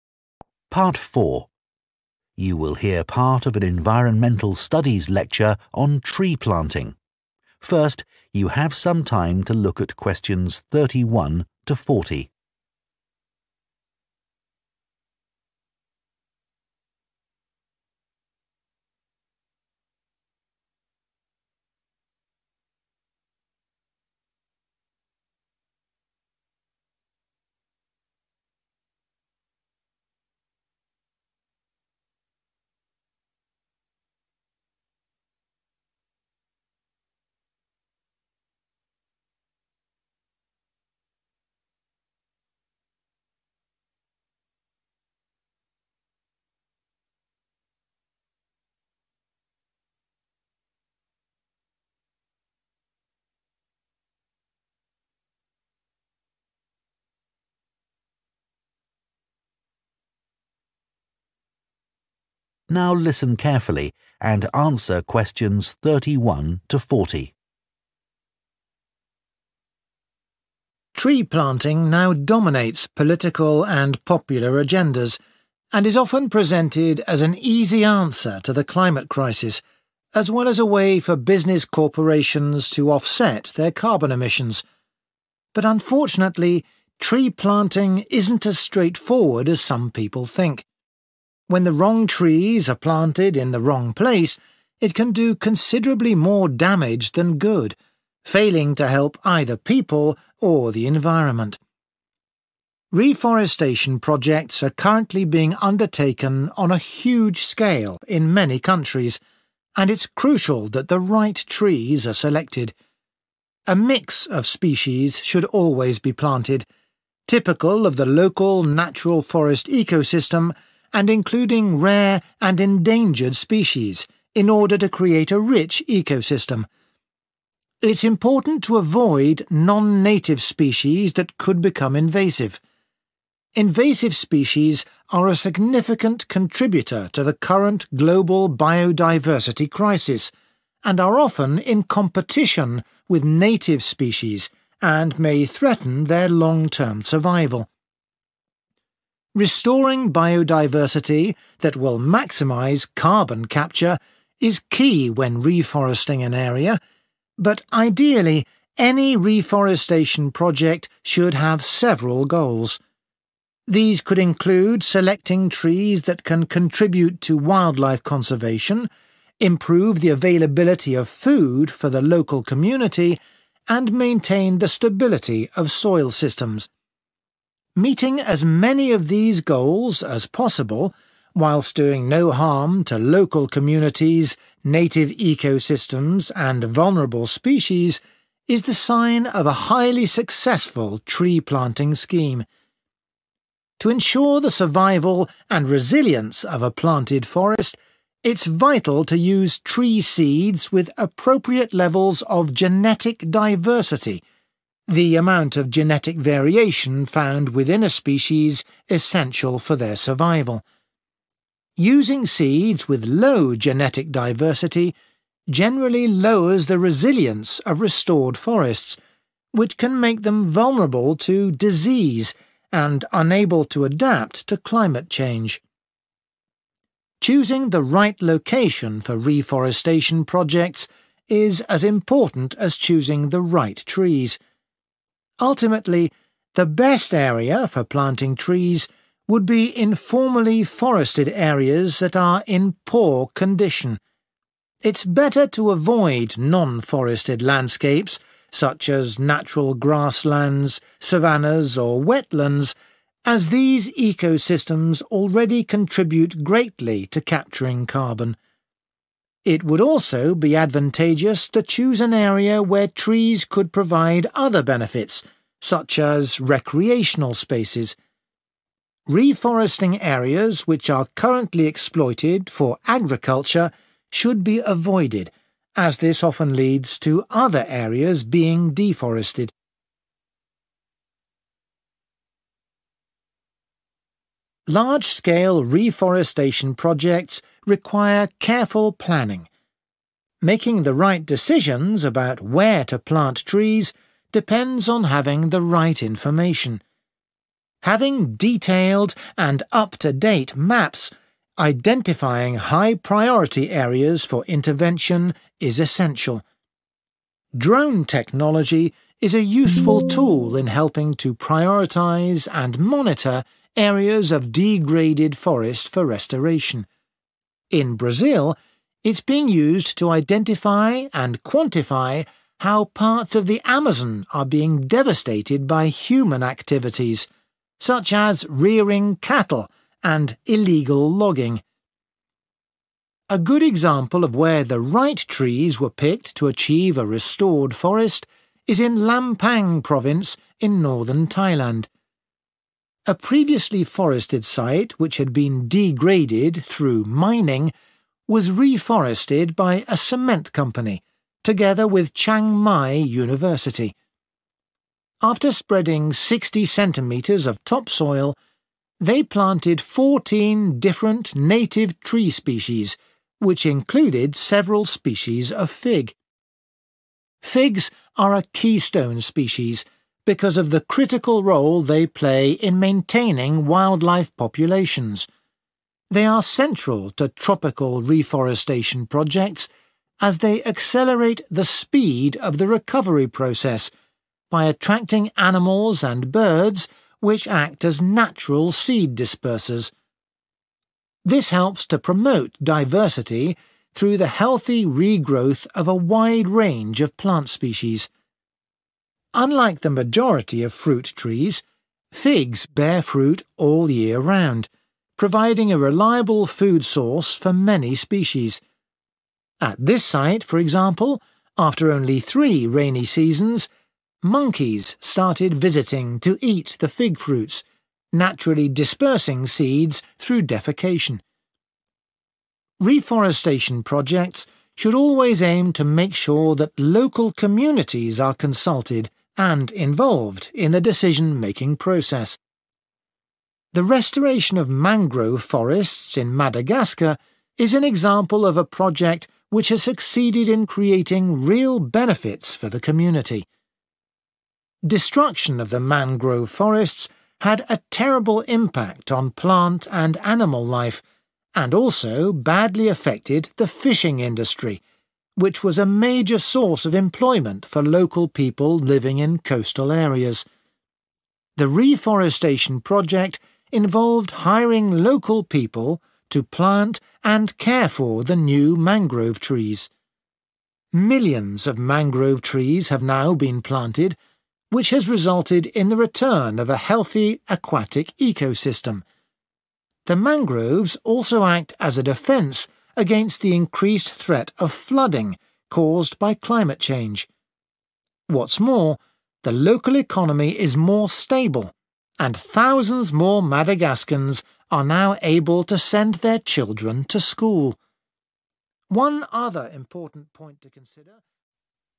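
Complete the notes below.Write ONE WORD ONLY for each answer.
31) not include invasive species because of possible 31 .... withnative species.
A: competition

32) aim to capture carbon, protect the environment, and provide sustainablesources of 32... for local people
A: food

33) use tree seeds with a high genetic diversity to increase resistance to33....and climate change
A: disease

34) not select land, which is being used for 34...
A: agriculture

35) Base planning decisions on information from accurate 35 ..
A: maps

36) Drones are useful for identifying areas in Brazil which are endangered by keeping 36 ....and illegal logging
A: cattle

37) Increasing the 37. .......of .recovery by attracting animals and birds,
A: speed

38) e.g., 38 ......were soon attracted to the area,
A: monkeys

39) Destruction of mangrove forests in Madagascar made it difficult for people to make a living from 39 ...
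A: fishing

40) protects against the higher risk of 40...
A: flooding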